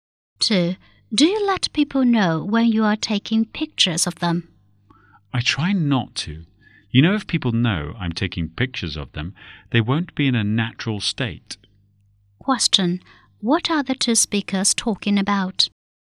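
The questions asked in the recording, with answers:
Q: What are the two speakers talking about?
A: Taking pictures of people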